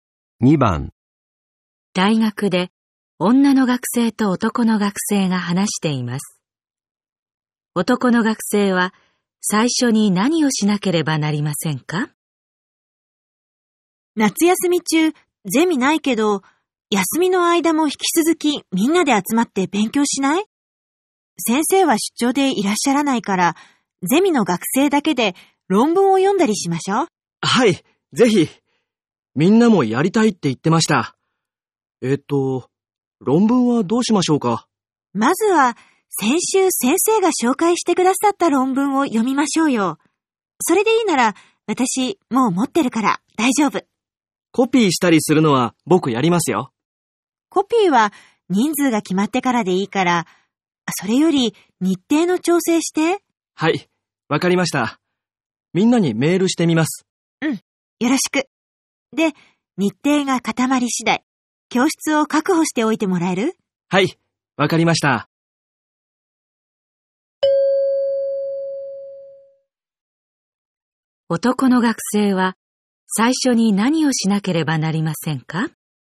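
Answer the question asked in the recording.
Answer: みんなにメールして日程を調整する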